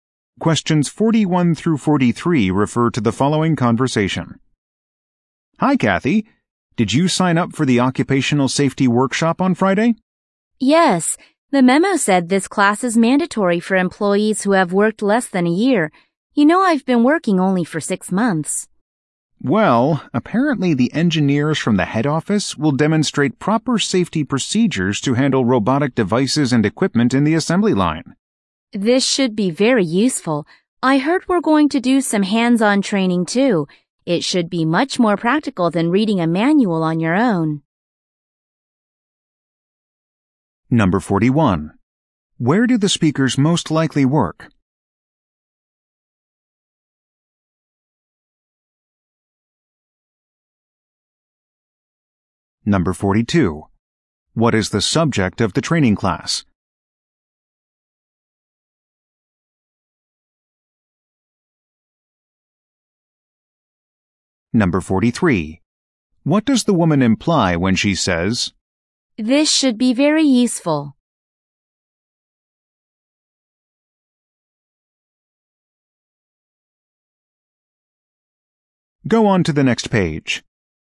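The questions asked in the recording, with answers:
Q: Where do the speakers most likely work?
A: At a factory with an assembly line

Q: What is the subject of the training class?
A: Safety procedures for handling robotic equipment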